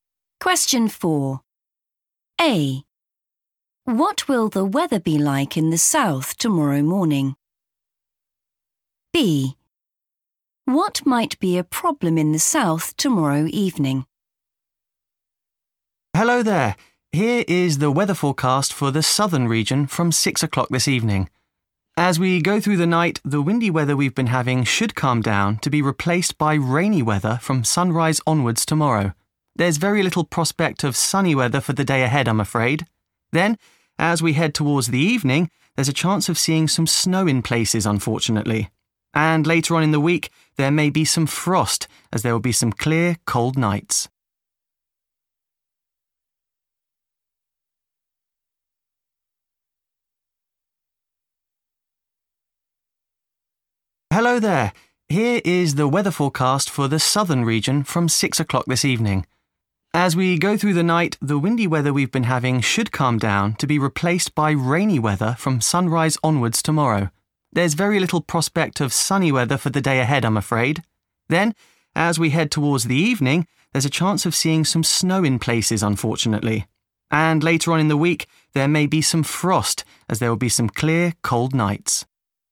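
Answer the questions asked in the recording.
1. rainy
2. snow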